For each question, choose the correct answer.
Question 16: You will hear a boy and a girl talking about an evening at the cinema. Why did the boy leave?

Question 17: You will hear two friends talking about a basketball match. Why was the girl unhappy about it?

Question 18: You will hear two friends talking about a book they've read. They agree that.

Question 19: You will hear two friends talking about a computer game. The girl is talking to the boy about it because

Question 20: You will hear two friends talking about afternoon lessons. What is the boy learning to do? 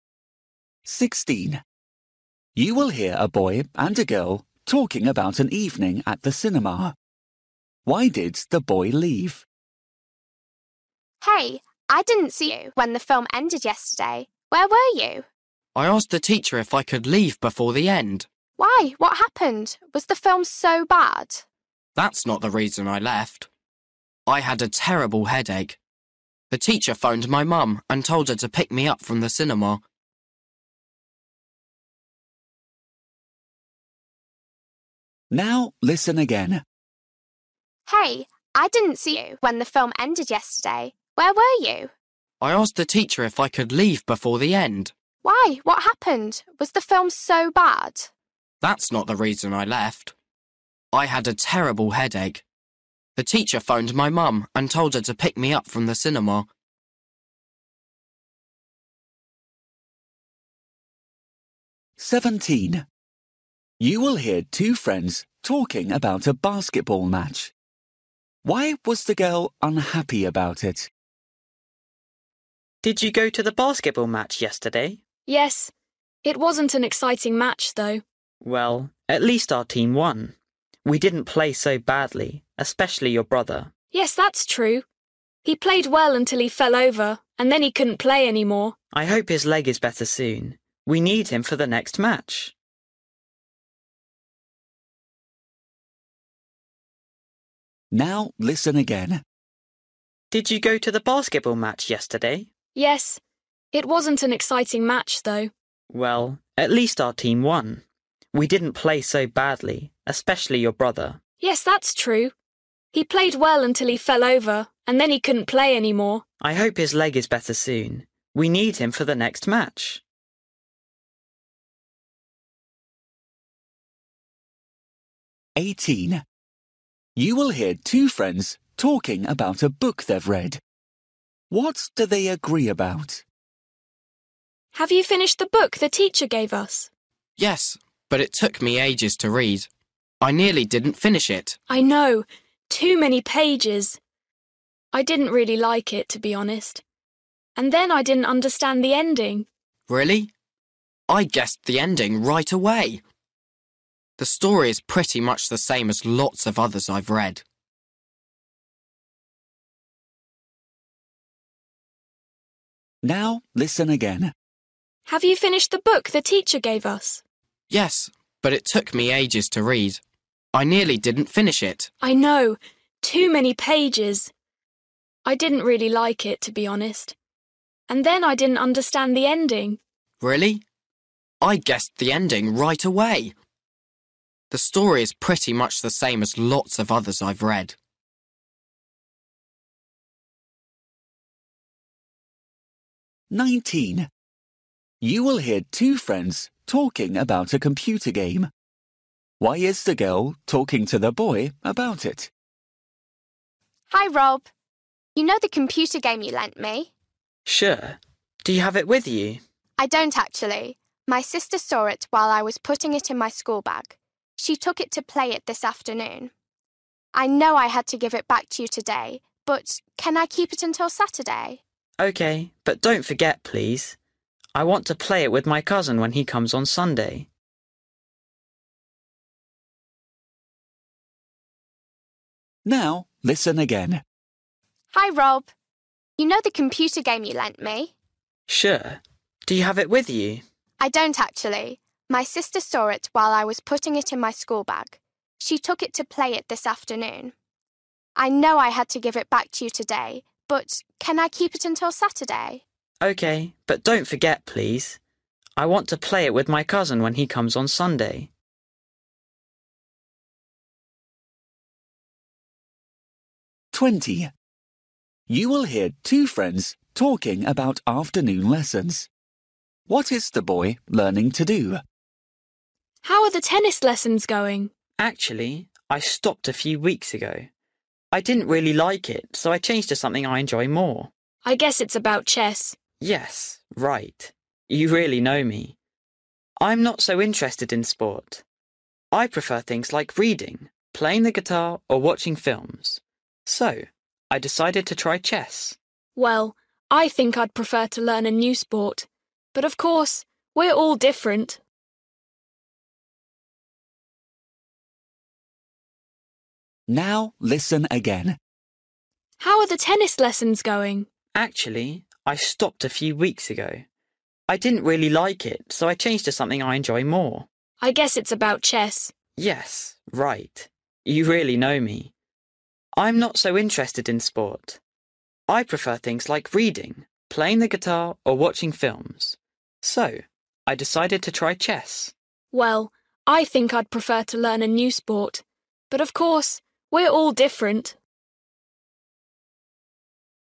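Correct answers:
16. He had a terrible headache.
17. It wasn't an exciting match.
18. the book was too long.
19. she wants to keep it until Saturday.
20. play chess

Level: Luyện nghe trình độ A2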